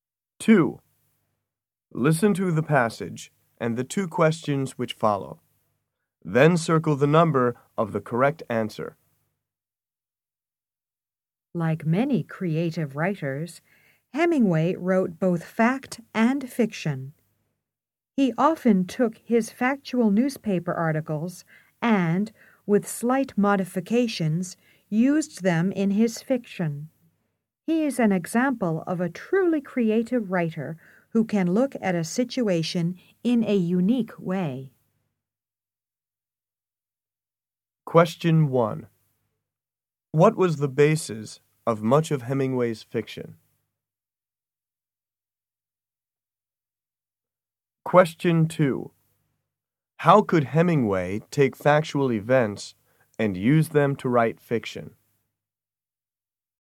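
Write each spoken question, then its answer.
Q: What was the basis of much of Hemingway's fiction?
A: His factual newspaper articles

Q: How could Hemingway take factual events and use them to write fiction?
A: He could look at a situation in a unique way, making slight changes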